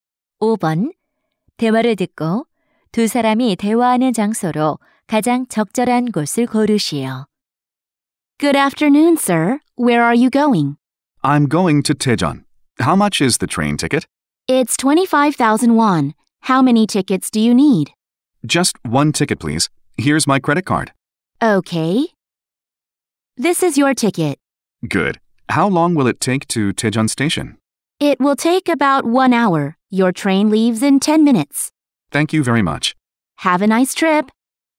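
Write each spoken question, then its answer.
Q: 대화를 듣고 두 사람이 대화하는 장소로 가장 적절한 곳을 고르시오.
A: 기차역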